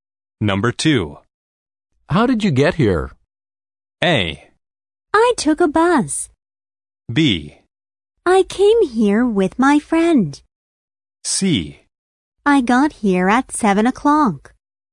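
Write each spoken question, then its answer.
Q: How did you get here?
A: A: I took a bus.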